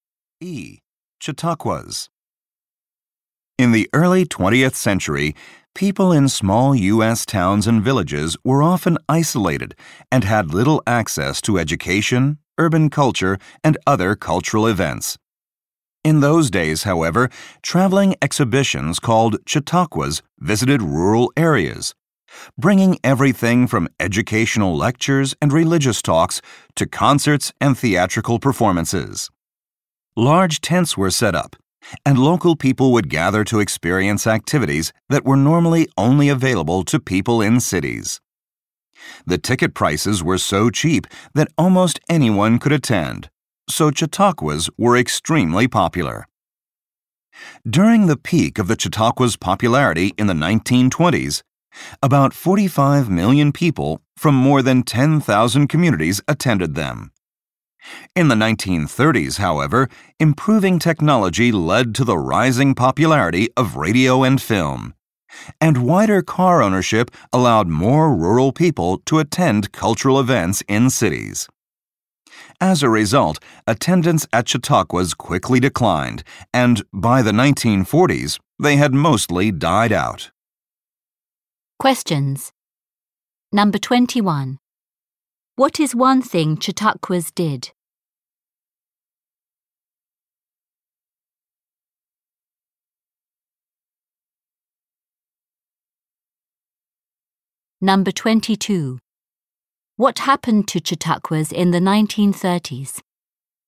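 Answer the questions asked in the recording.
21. They brought cultural and educational events to rural areas.
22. Fewer people went, because of radio, film and cars.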